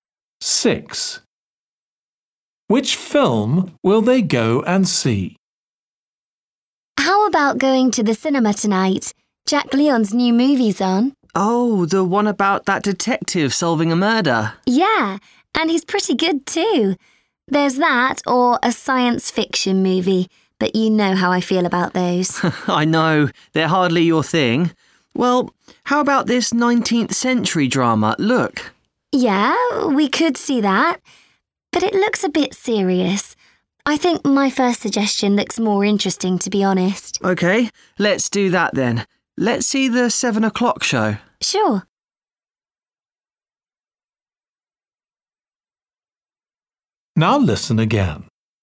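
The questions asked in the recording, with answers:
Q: Which film will they go and see?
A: the detective film about a murder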